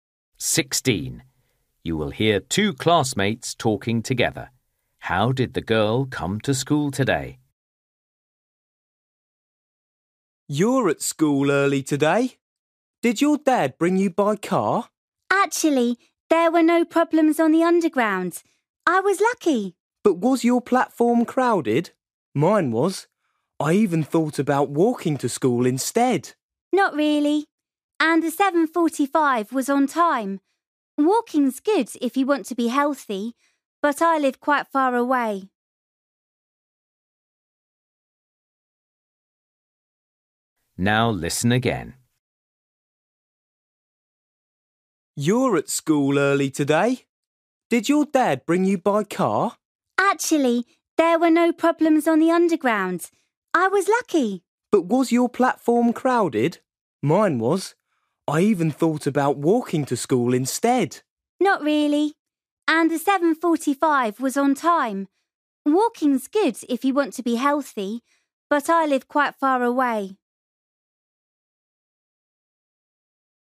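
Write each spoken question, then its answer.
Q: How did the girl come to school today?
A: By underground (train)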